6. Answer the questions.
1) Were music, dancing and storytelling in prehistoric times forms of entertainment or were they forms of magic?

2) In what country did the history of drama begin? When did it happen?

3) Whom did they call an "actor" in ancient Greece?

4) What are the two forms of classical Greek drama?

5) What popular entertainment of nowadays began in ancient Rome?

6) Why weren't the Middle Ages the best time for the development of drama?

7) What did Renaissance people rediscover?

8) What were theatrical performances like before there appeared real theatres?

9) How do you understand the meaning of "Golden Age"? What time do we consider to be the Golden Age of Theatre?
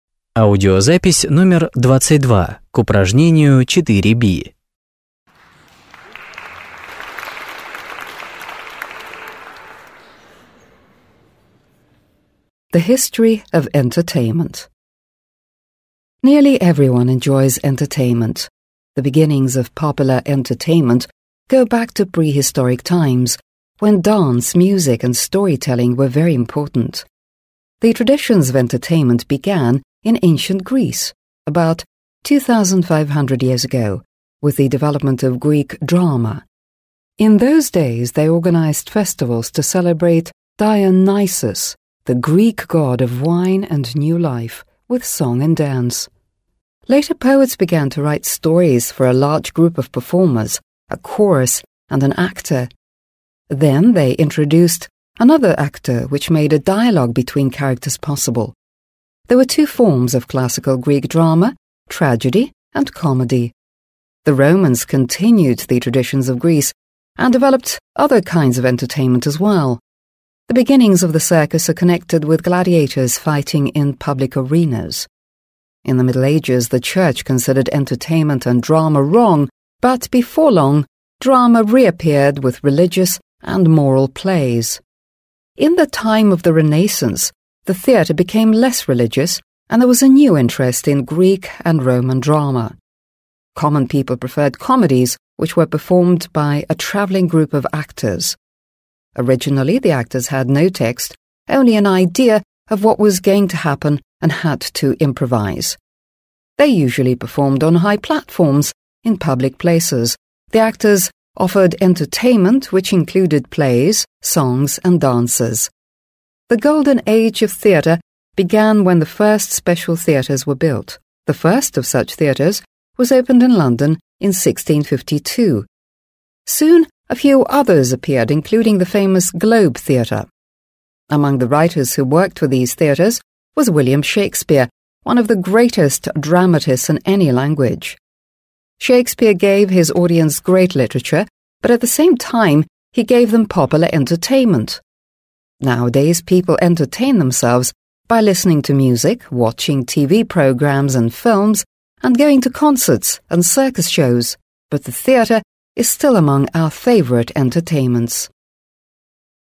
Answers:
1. Music, dancing and storytelling in prehistoric times were forms of entertainment.
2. The traditions of entertainment began in ancient Greece about 2,500 years ago with the development of Greek drama.
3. An actor in ancient Greece was a storyteller in tragedy or comedy. Actors performed with a chorus.
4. The two forms of classical Greek drama were tragedy and comedy.
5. The circus began in ancient Rome from gladiators fights.
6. The Middle Ages weren't the best time for the development of drama because the church considered entertainment and drama wrong.
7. The Renaissance people rediscovered the Greek and Roman drama.
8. The actors had to improvise, they usually performed on high platforms in public places.
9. The Golden Age of Theatre began when the first special theatres were built.

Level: 8 класс